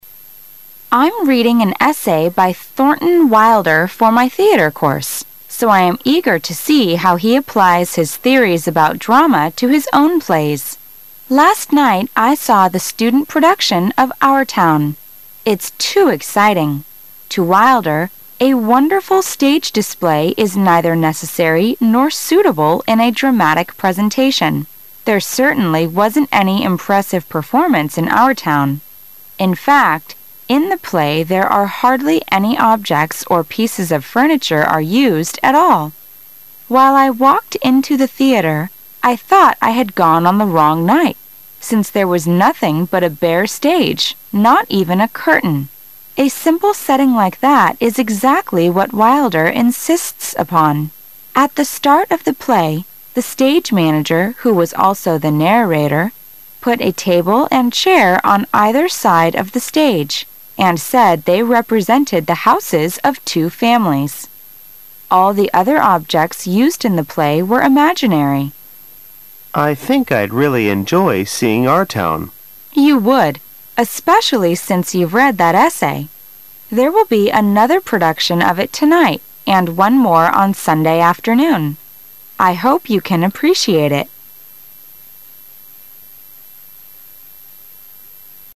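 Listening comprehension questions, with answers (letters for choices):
Questions 22 - 25 are based on the following dialogue.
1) What is the woman reading for her theater course?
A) The play Our Town.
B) An essay by Thornton Wilder.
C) A critical review of Our Town.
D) A short story about New Hampshire.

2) When did the woman see a play by Thornton Wilder?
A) The previous year.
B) Earlier that day.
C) The night before,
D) Sunday afternoon.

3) Why was the stage bare when the woman went to the theater?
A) She went on the wrong date.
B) She arrived too early.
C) Most of the objects used in the play were imaginary.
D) The students can't afford objects used in the play.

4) What did the objects placed on the either side of the stage represent?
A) Two actors.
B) Two homes.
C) Two towns.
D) Two street corners.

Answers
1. B
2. C
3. C
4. B

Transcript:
[解析] 22-25 W: I'm reading an essay by Thornton Wilder for my theater course, so I am eager to see how he applies his theories about drama to his own plays. 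Last night, I saw the student production of Our Town. To Wilder, a wonderful stage display is neither necessary nor suitable in a dramatic presentation. There certainly wasn't any impressive performance in Our Town. In fact, in the play there are hardly any objects or pieces of furniture are used at all. While I walked into the theater, I thought I had gone on the wrong night, since there was nothing but a bare stage, not even a curtain. A simple setting like that is exactly what Wilder insists upon. At the start of the play, the stage manager who was also the narrator, put a table and chair on either side of the stage and said they represented the houses of two families. All the other objects used in the play were imaginary. W: I think I'd really enjoy seeing Our Town. M: You would, especially since you've read that essay. There will be another production of it tonight and one more on Sunday afternoon. 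I hope you can appreciate it.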